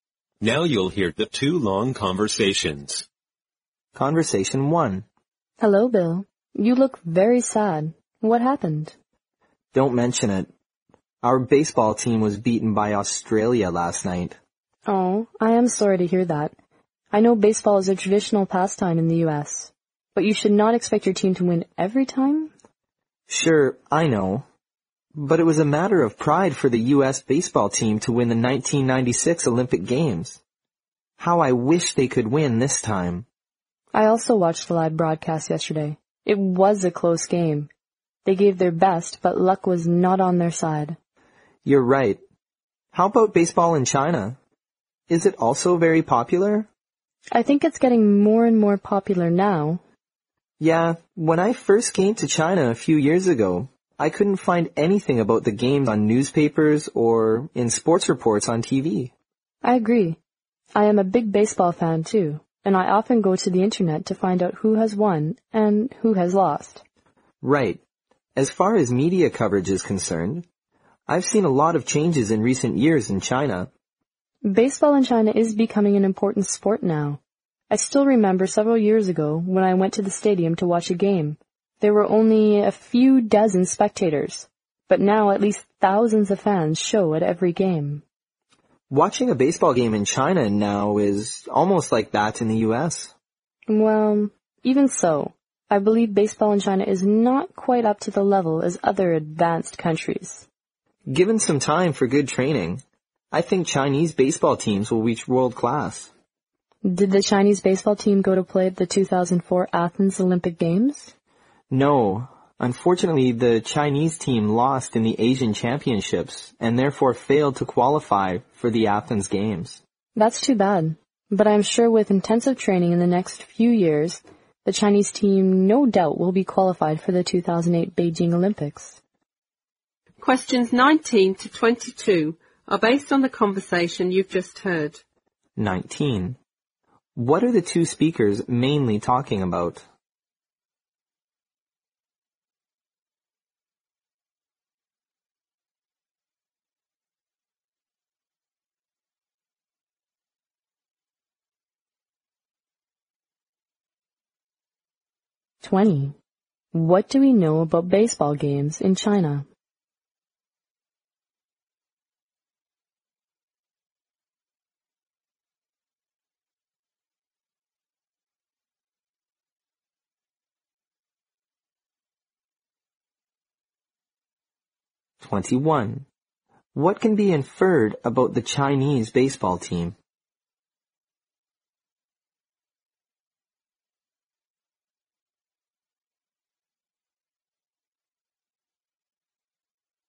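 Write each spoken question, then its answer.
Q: What are the two speakers mainly talking about?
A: Baseball, especially baseball in China

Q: What do we know about baseball games in China?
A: They are getting more and more popular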